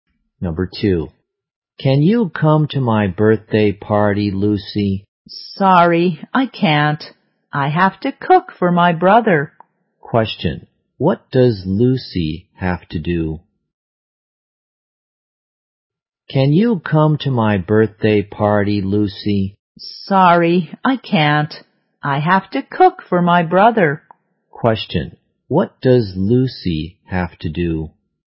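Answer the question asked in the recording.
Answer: Cook for her brother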